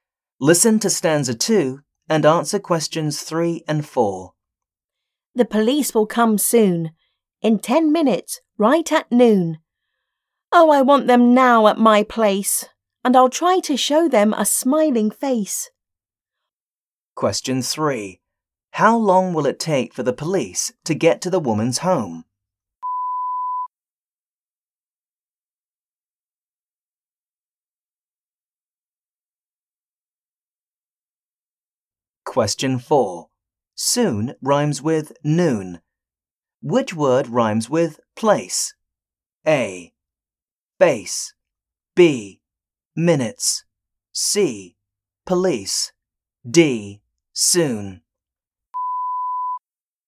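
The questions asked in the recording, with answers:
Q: How long will it take for the police to get to the woman's home?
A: 10 minutes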